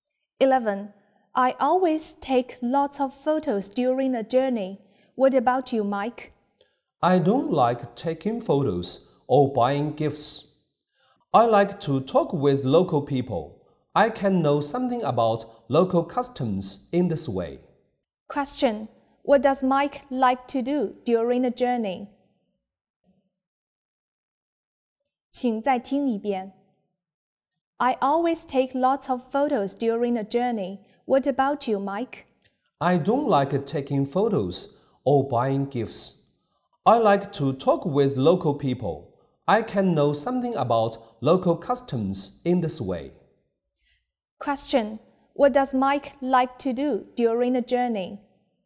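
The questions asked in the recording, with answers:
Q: What does Mike like to do during a journey?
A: Talk with local people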